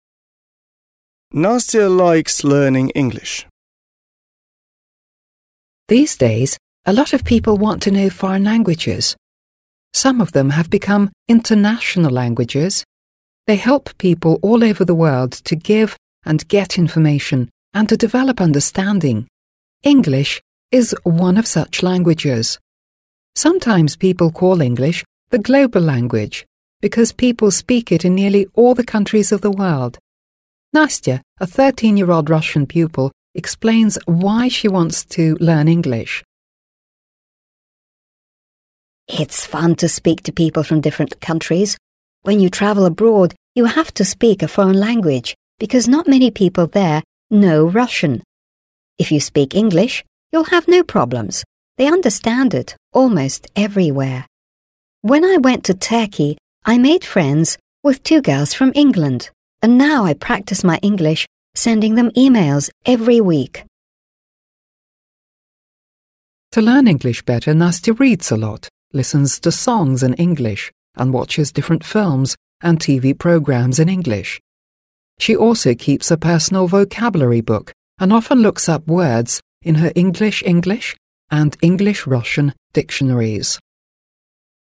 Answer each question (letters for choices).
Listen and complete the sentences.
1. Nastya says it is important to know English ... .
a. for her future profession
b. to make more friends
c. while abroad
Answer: c

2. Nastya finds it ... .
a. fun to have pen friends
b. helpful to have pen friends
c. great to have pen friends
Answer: a

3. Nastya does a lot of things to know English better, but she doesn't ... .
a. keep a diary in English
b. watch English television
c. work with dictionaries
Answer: a

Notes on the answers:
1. Настя объясняет необходимость знания языка контекстом путешествий: «When you travel abroad you have to speak a foreign language» (Когда вы путешествуете за границей, вам приходится говорить на иностранном языке). Фраза while abroad является сокращением от «while you are abroad» (в то время, пока вы за границей).
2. В записи звучит фраза: «It's fun to speak to people from different countries» (Весело/увлекательно разговаривать с людьми из разных стран). Далее Настя упоминает, что она отправляет им электронные письма («sending them emails»). Друзья, с которыми общаются письмами, называются pen friends. Конструкция find it + прилагательное (finds it fun) переводится как «считать это каким-то» (считает это увлекательным).
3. Это задание на исключение. В тексте перечисляется, что Настя делает: «reads a lot» (много читает), «listens to songs» (слушает песни), «watches different films» (смотрит фильмы — то есть English television), «looks up words in her... dictionaries» (ищет слова в словарях). Также она ведет «vocabulary book» (словарь для записи слов), но в тексте нигде не сказано про diary (личный дневник с описанием событий дня). Поэтому правильный ответ — то, чего она не делает.

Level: 7 класс